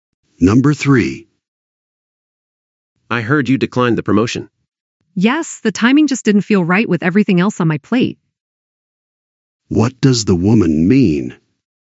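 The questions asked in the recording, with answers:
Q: What does the woman mean?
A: She turned down the promotion because she had too much else going on.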